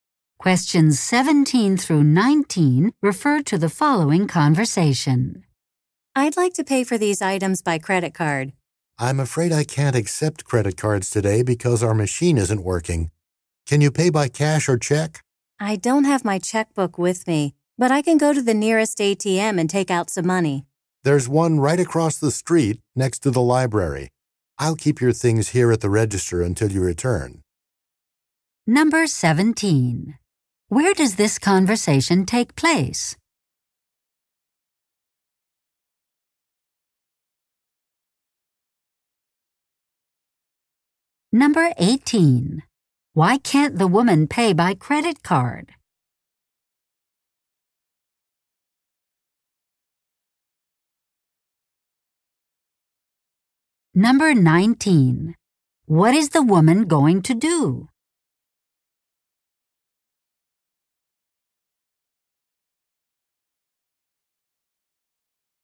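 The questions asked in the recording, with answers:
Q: Where does this conversation take place?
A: In a store, at the register

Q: Why can't the woman pay by credit card?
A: The card machine isn't working

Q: What is the woman going to do?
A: Go to an ATM to get cash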